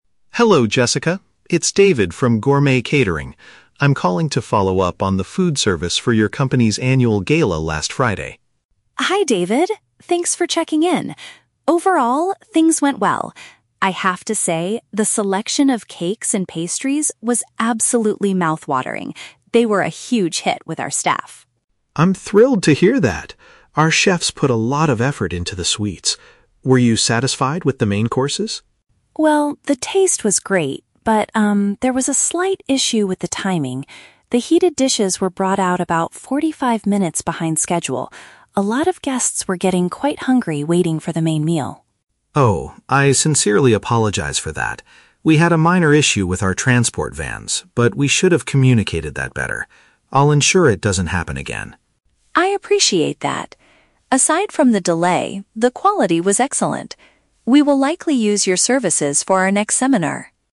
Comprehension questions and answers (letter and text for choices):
Listen to a phone conversation between a catering representative and an administrative staff member. Choose the correct answer (A, B, or C).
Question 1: What did the company employees enjoy the most?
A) The main courses.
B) The sweet baked goods.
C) The polite service staff.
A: B) The sweet baked goods.

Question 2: What was Jessica's main complaint about the event?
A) The delivery drivers were very noisy.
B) The food was completely cold when it arrived.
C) The hot meals were not served on time.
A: C) The hot meals were not served on time.

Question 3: What is the most likely outcome of this conversation?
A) The catering company will be hired again in the future.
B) Jessica will ask the manager for a full refund.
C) David will send some free cakes to say sorry.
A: A) The catering company will be hired again in the future.

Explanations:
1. Jessica praises the "cakes and pastries" and says they were a "huge hit" with the staff. "Sweet baked goods" is a B1 paraphrase for cakes and pastries (desserts).
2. Jessica mentions that the "heated dishes" (hot meals) were brought out "behind schedule" (not on time).
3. At the end of the conversation, Jessica states, "We will likely use your services for our next seminar." This implies they will hire the catering company again.

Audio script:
David: Hello, Jessica. It's David from Gourmet Catering. I'm calling to follow up on the food service for your company's annual gala last Friday.
Jessica: Hi David. Thanks for checking in. Overall, things went well. I have to say, the selection of cakes and pastries was absolutely mouth-watering. They were a huge hit with our staff.
David: I'm thrilled to hear that! Our chefs put a lot of effort into the sweets. Were you satisfied with the main courses?
Jessica: Well, the taste was great, but, um, there was a slight issue with the timing. The heated dishes were brought out about forty-five minutes behind schedule. A lot of guests were getting quite hungry waiting for the main meal.
David: Oh, I sincerely apologize for that. We had a minor issue with our transport vans, but we should have communicated that better. I'll ensure it doesn't happen again.
Jessica: I appreciate that. Aside from the delay, the quality was excellent. We will likely use your services for our next seminar.